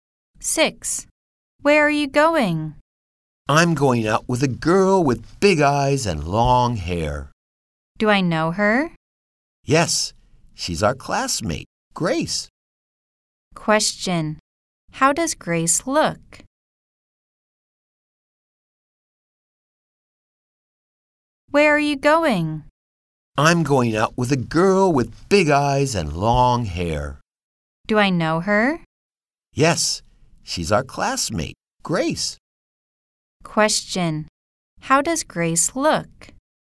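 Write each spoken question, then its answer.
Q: Question. How does Grace look?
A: She has big eyes and long hair.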